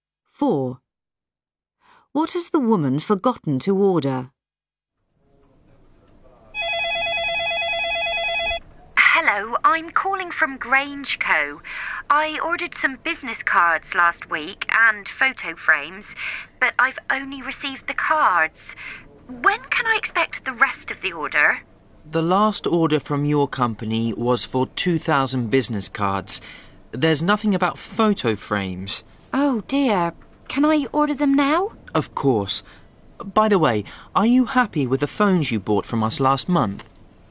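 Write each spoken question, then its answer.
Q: What has the woman forgotten to order?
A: Photo frames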